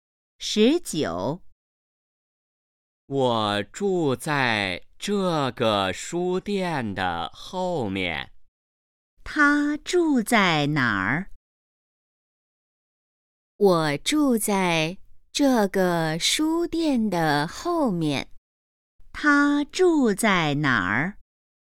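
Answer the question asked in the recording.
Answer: 书店的后面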